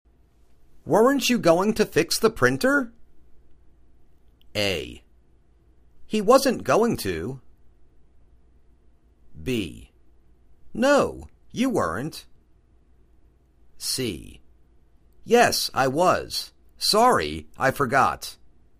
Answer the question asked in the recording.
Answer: Yes, I was. Sorry, I forgot.